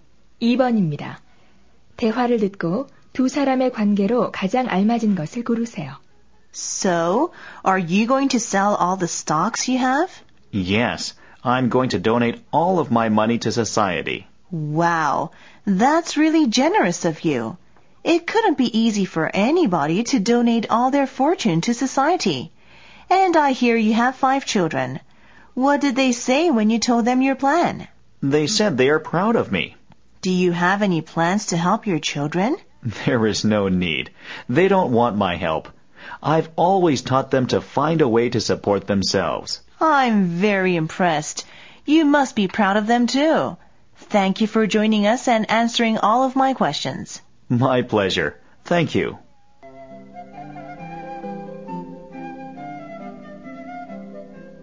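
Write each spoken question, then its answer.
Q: 대화를 듣고 두 사람의 관계로 가장 알맞은 것을 고르세요.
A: 인터뷰 진행자와 전 재산을 기부하는 사람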